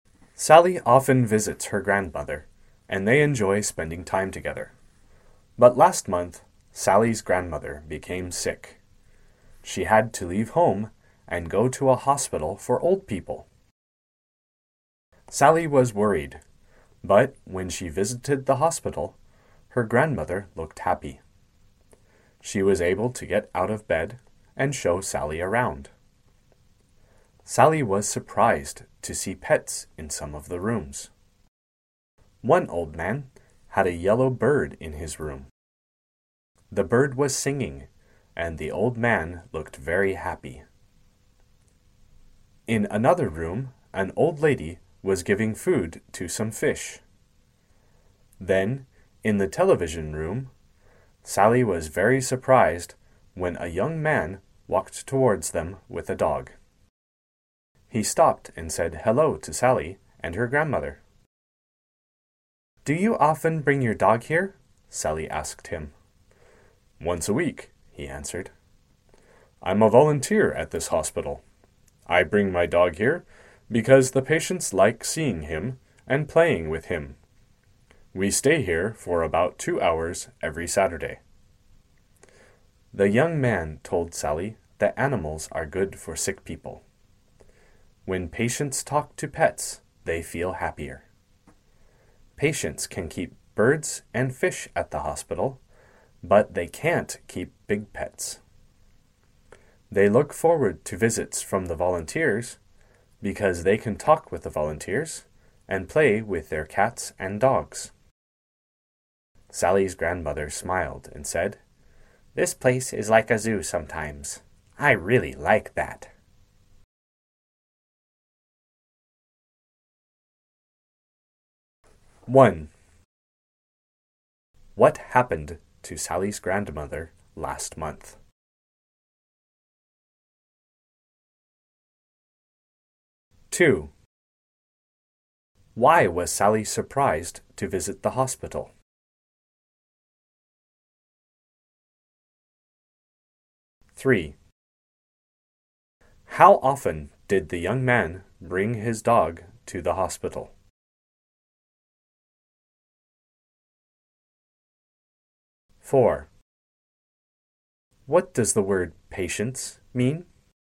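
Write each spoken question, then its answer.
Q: What happened to Sally's grandmother last month?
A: She became sick and had to go to a hospital for old people.

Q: Why was Sally surprised to visit the hospital?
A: She saw pets in some of the rooms.

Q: How often did the young man bring his dog to the hospital?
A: Once a week (every Saturday).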